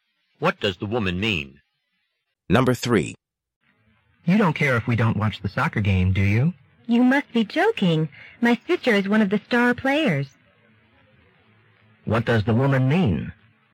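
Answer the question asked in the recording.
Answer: She wants to watch the soccer game because her sister is playing.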